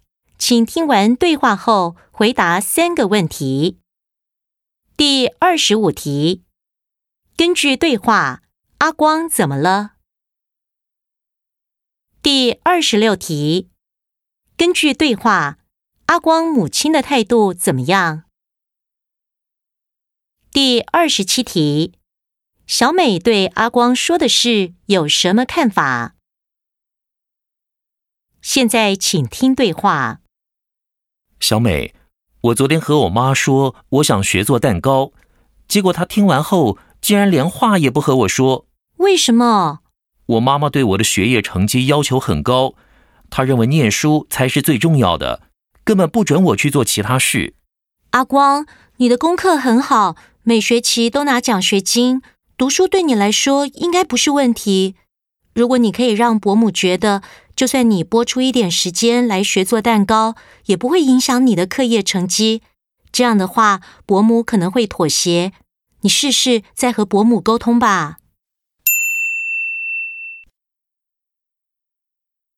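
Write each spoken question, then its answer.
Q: 根据对话,阿光怎么了?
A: 他想学做蛋糕,母亲听后不和他说话

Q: 根据对话,阿光母亲的态度怎么样?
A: 反对,认为念书最重要,不准他做其他事

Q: 小美对阿光说的事有什么看法?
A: 她认为只要让母亲相信学做蛋糕不影响成绩,母亲可能会妥协,建议他再沟通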